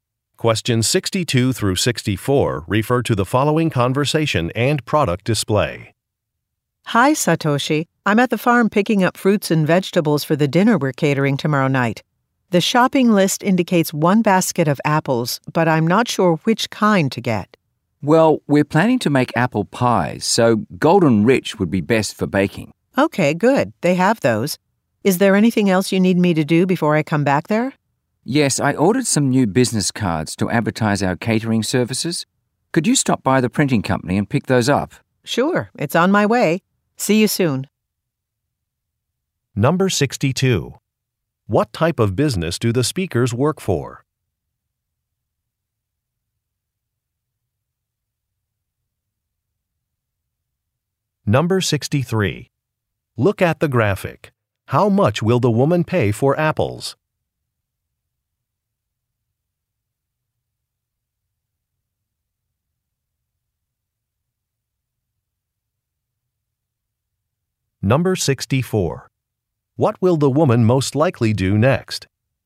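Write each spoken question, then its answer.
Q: What type of business do the speakers work for?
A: A catering business

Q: What will the woman most likely do next?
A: Pick up business cards at the printing company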